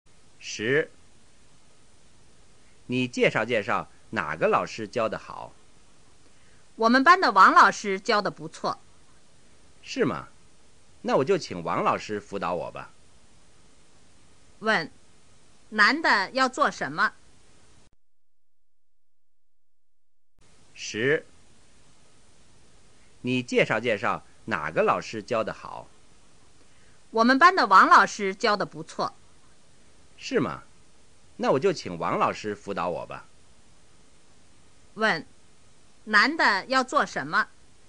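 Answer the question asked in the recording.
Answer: 请王老师辅导他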